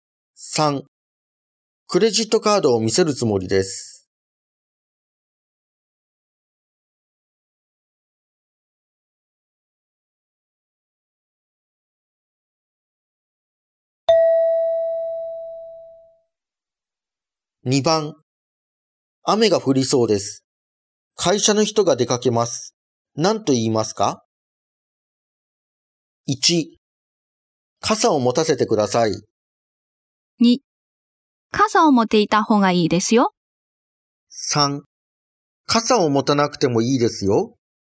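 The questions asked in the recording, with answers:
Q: 何と言いますか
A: 2: 傘を持っていた方がいいですよ。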